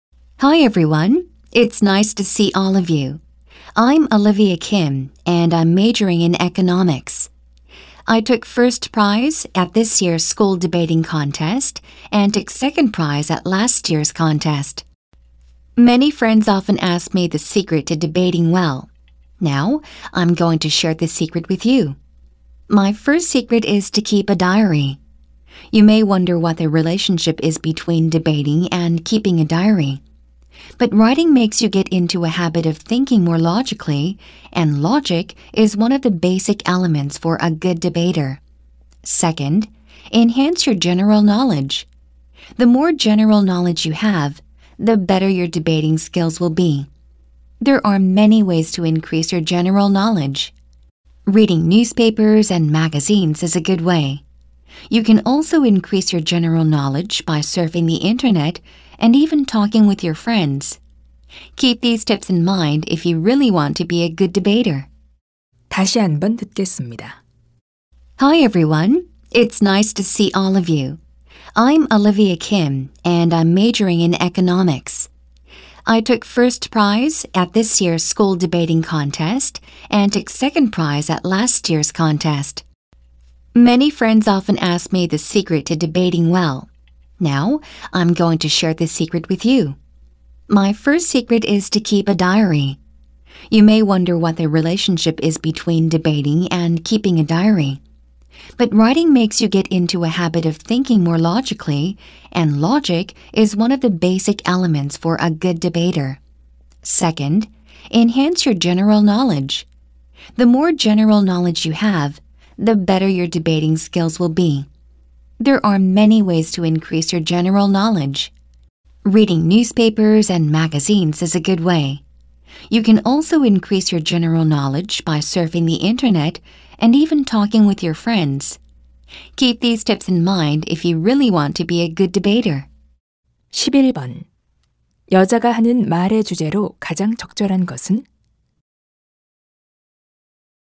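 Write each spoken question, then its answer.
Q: 여자가 하는 말의 주제로 가장 적절한 것은?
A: 토론을 잘하는 비결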